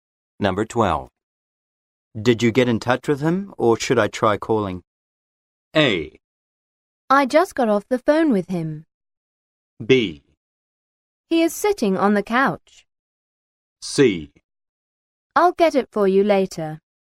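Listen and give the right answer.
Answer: A: I just got off the phone with him.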